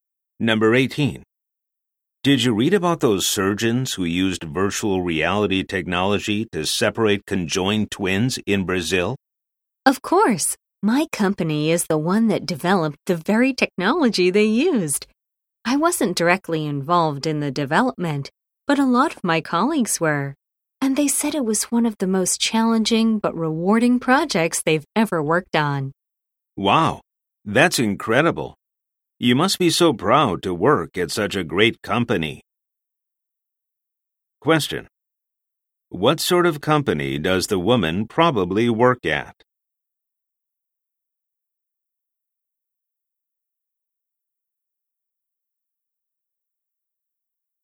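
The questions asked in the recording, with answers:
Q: What sort of company does the woman probably work at?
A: A virtual reality technology company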